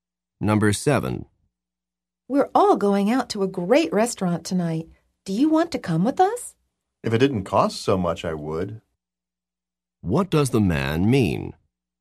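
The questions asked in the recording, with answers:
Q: What does the man mean?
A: He won't go because it costs too much.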